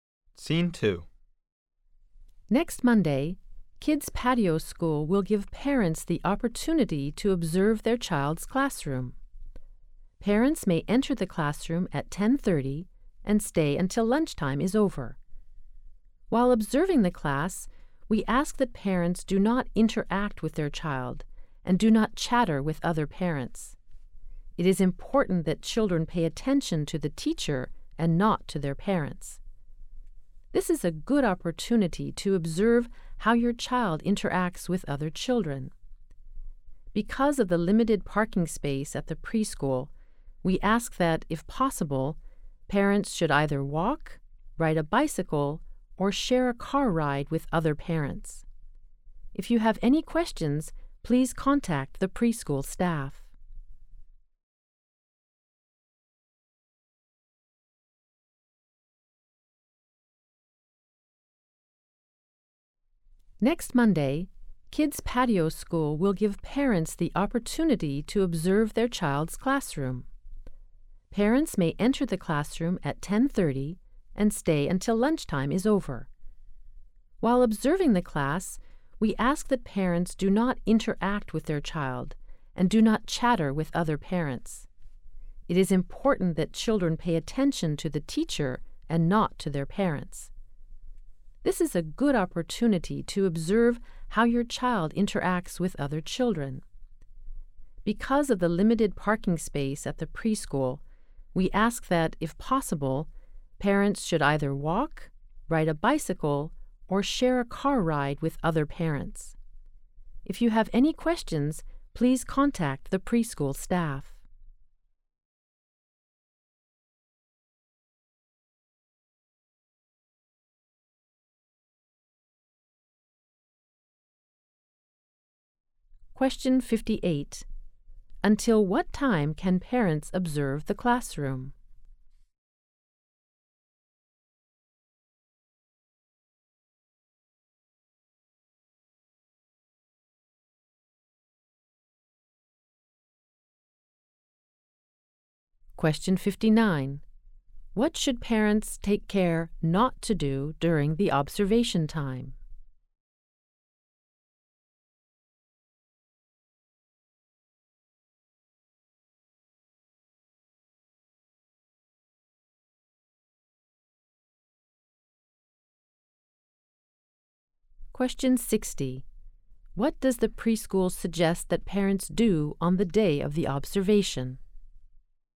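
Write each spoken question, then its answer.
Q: Until what time can parents observe the classroom?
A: Until lunchtime is over.

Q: What should parents take care not to do during the observation time?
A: Interact with their child or chatter with other parents.

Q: What does the preschool suggest that parents do on the day of the observation?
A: Walk, ride a bicycle, or share a car ride with other parents.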